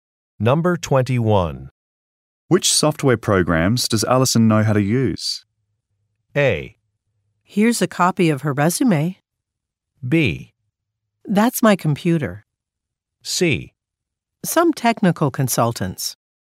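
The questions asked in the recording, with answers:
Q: Which software programs does Allison know how to use?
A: A: Here's a copy of her resume.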